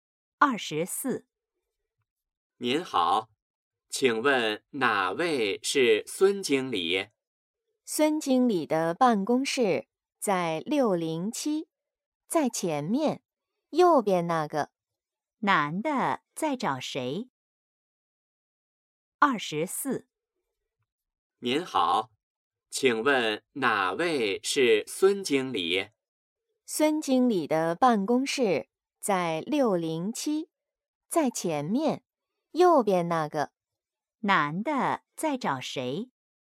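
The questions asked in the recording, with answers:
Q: 男的在找谁?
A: 孙经理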